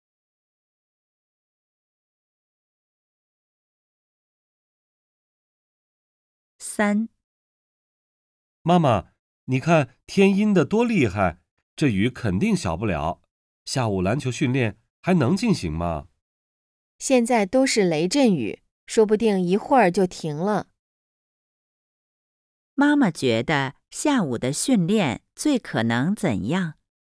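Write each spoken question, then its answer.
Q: 妈妈觉得下午的训练最可能怎样?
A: 照常进行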